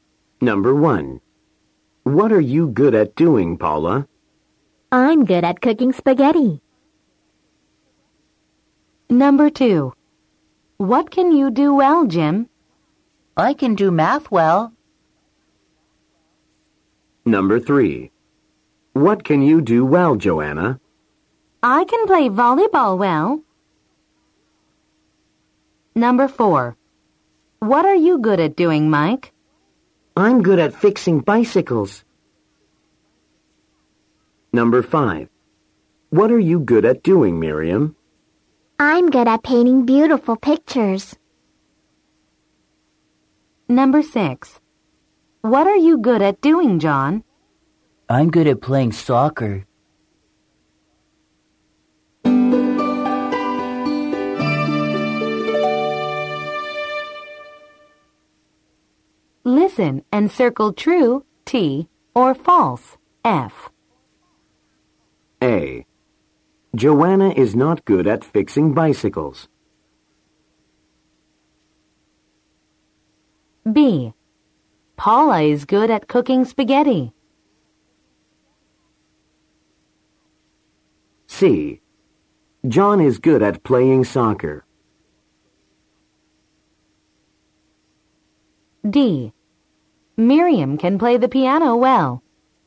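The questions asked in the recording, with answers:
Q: Paula is good at cooking spaghetti.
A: True

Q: John is good at playing soccer.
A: True

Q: Miriam can play the piano well.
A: False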